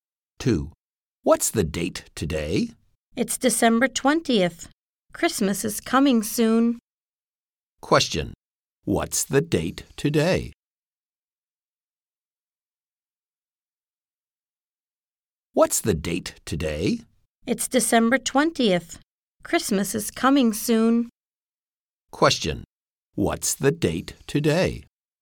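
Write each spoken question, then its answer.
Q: What's the date today?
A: December 20th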